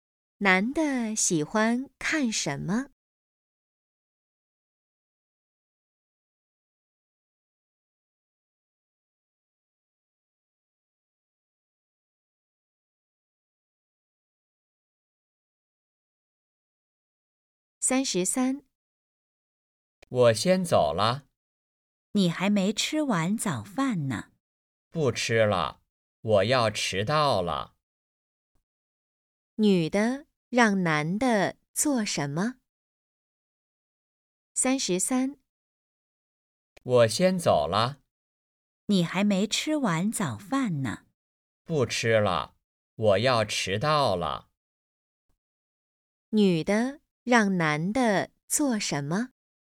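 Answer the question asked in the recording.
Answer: 吃完早饭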